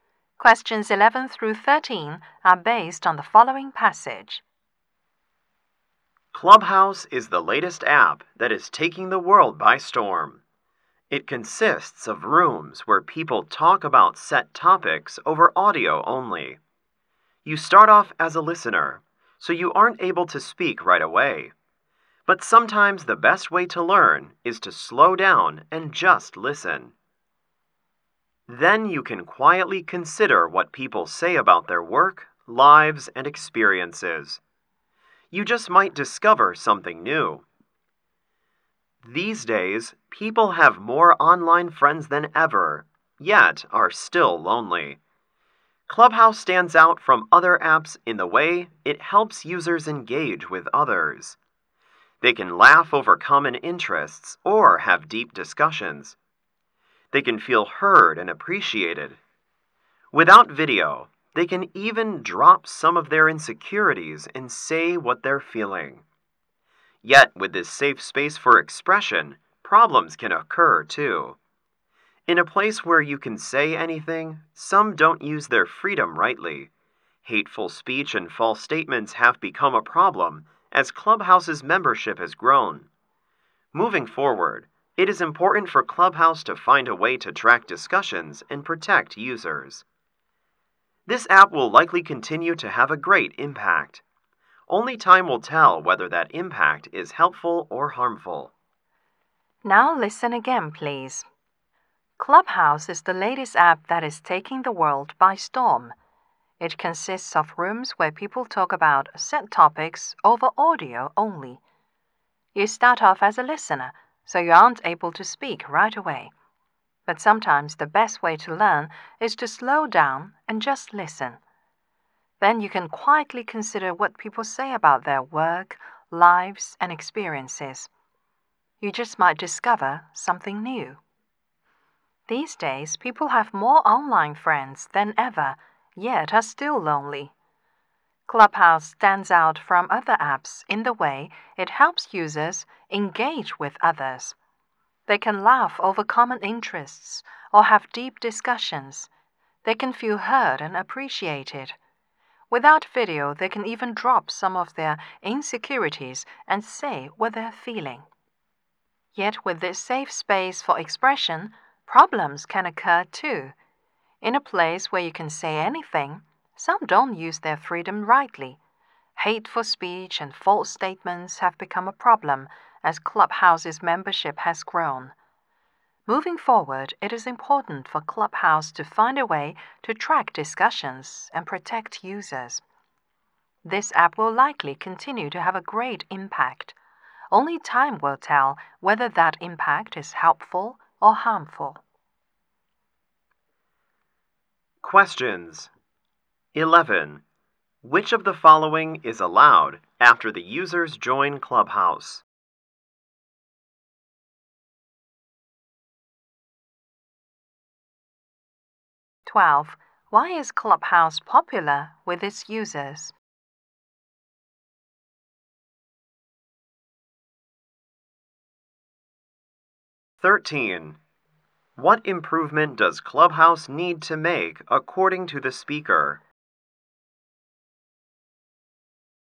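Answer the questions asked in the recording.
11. Listening to others' discussions
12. It helps users engage with others and feel heard
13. Track discussions and protect users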